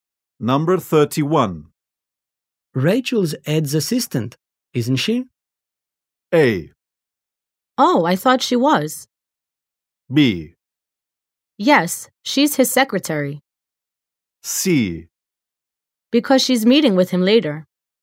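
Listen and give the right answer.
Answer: B: Yes, she's his secretary.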